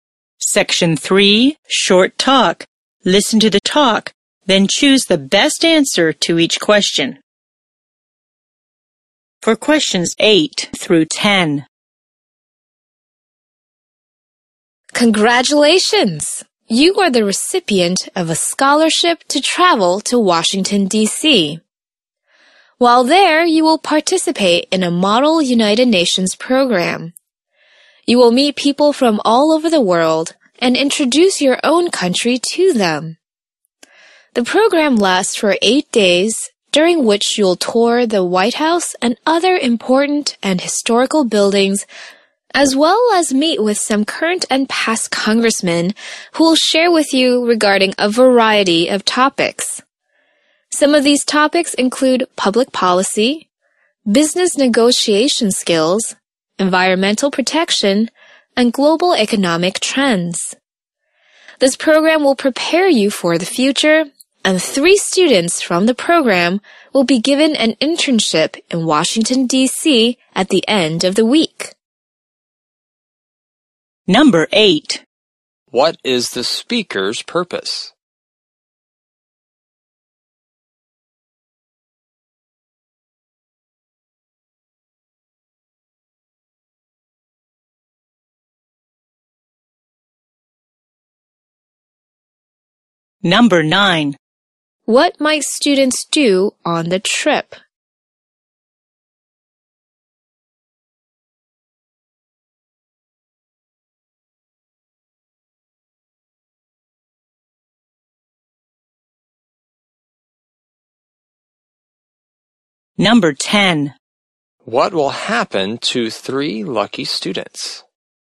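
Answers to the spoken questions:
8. To tell a student they won a scholarship to a program in Washington, D.C.
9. Tour the White House and meet congressmen
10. They will get an internship in Washington, D.C.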